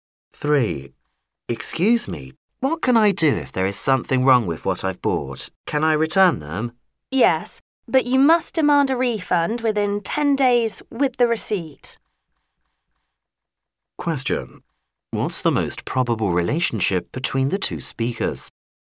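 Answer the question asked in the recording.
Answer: Customer and shop assistant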